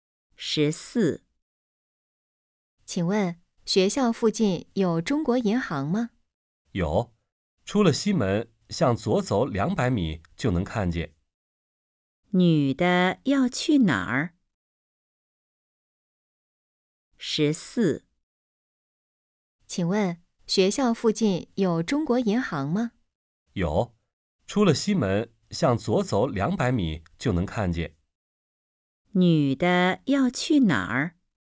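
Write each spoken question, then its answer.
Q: 女的要去哪儿?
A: 中国银行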